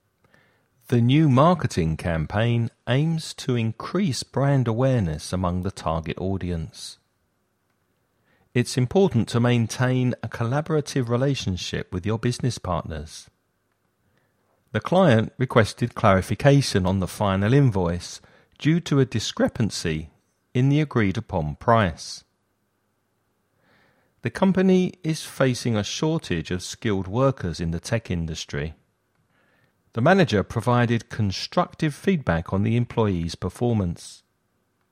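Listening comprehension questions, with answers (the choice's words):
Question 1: The new marketing campaign aims to _________ brand awareness among the target audience.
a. outsource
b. delegate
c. increase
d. finalize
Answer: increase

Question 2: It's important to maintain a _________ relationship with your business partners.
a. destructive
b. collaborative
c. outsourced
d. finalized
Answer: collaborative

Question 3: The client requested _________ on the final invoice due to a discrepancy in the agreed-upon price.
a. clarification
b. privatization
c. focus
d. finalization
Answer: clarification

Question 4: The company is facing a _________ of skilled workers in the tech industry.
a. sewage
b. shortage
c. mob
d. delegation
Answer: shortage

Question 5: The manager provided _________ feedback on the employee's performance.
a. outsourced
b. delegated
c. constructive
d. finalized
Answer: constructive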